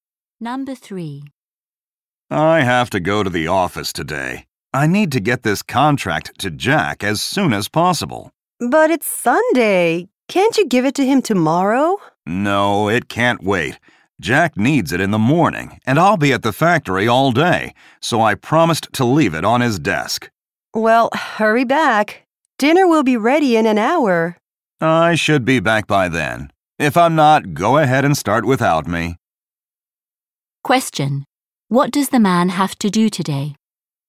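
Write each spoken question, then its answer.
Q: Question: What does the man have to do today?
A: Leave a contract on Jack's desk at the office.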